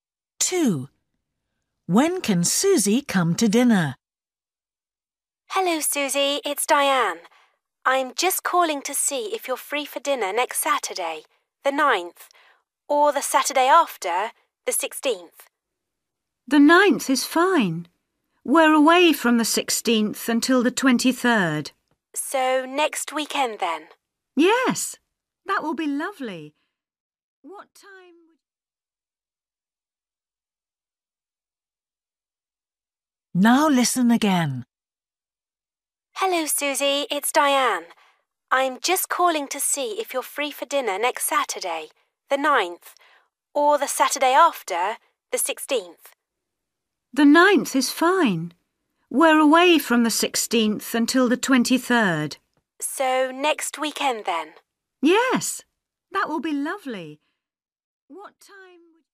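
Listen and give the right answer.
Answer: Saturday the 9th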